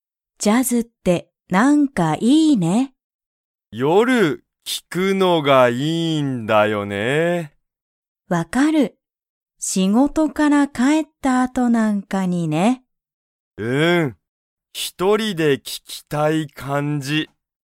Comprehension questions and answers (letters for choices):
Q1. リョウは、ジャズを、____聞(き)きたい。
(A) 一人(ひとり)で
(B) 友達(ともだち)と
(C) 会社(かいしゃ)で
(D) みんなで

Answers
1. A